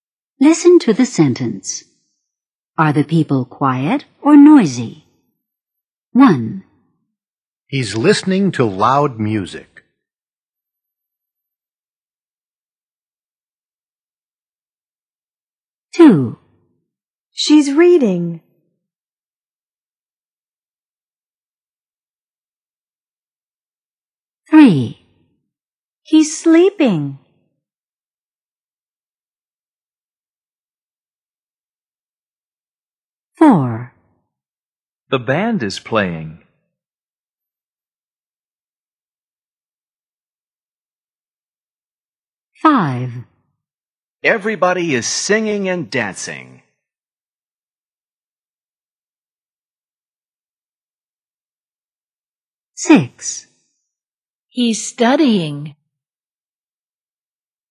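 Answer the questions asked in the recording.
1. noisy
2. quiet
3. quiet
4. noisy
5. noisy
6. quiet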